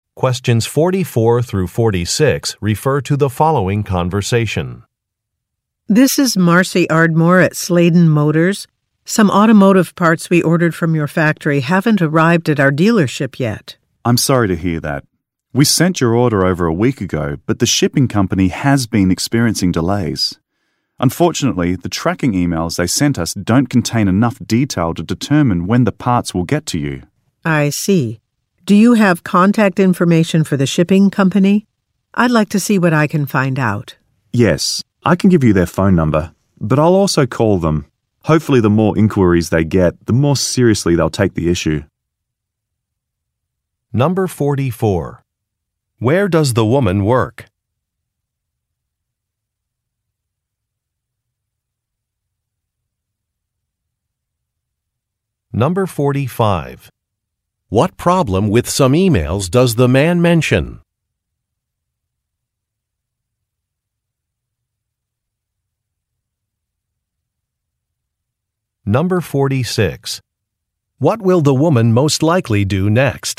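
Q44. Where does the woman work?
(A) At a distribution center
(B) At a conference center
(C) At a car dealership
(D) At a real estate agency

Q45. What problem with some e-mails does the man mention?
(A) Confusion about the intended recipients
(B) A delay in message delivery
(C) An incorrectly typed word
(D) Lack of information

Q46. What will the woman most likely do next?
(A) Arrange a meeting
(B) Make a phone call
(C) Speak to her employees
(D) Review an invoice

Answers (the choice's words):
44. At a car dealership
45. Lack of information
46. Make a phone call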